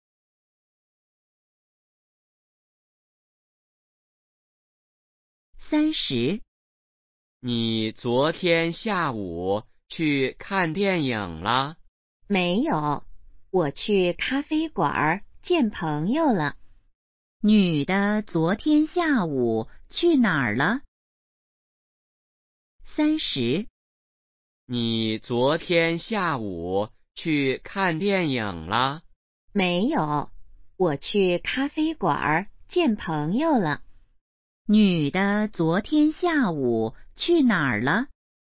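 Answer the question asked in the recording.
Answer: 咖啡馆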